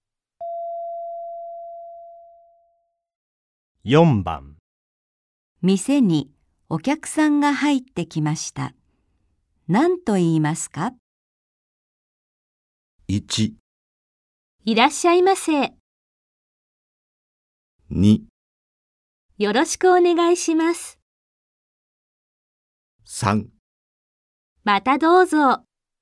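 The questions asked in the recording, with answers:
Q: 店にお客さんが入ってきました。何と言いますか?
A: 1: いらっしゃいませ。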